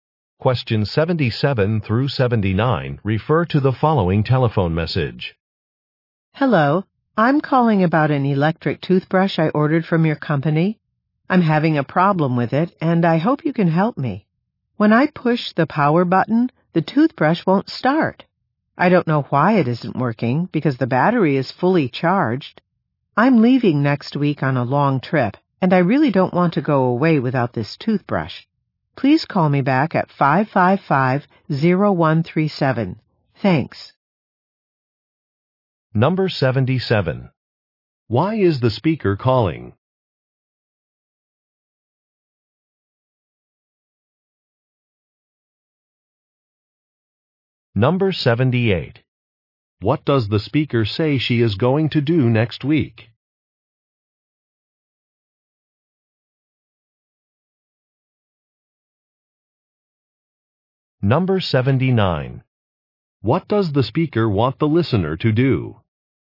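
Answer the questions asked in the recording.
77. Her electric toothbrush won't start
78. Go on a long trip
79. Call her back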